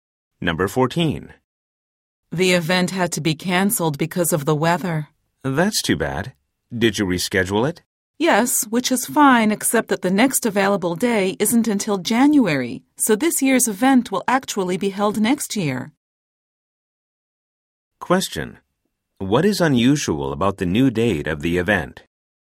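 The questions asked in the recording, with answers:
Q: What is unusual about the new date of the event?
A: This year's event will be held next year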